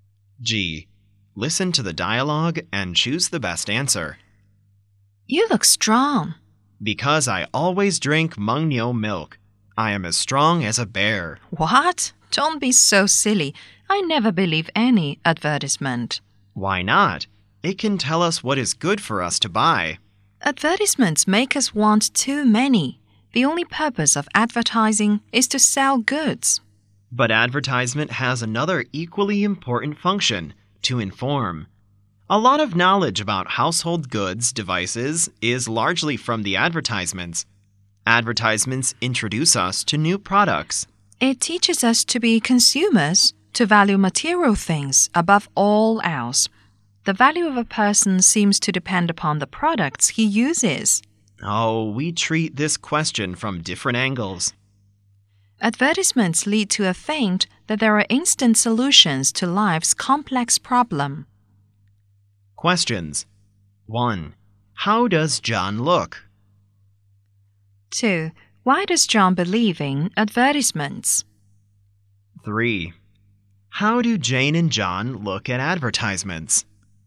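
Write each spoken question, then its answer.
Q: How does John look?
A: Strong

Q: How do Jane and John look at advertisements?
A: From different angles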